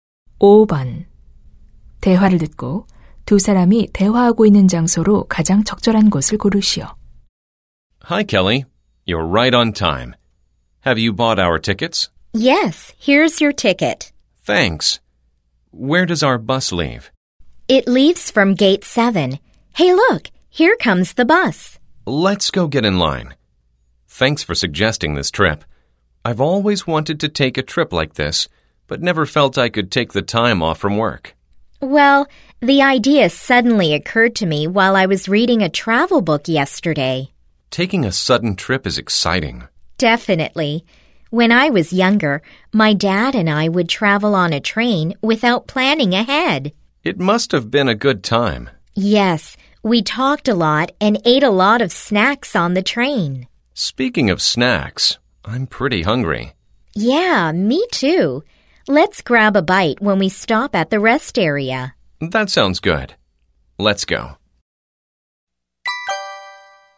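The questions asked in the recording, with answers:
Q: 대화를 듣고 두 사람이 대화하고 있는 장소로 가장 적절한 곳을 고르시오.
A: 버스 터미널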